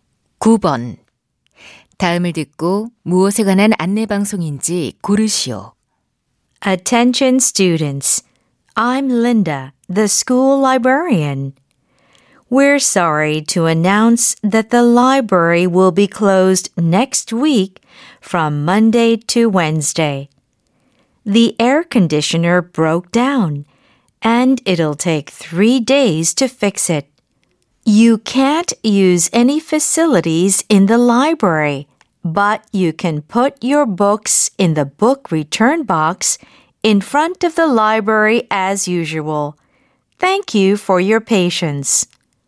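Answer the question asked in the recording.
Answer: 도서관 임시 휴관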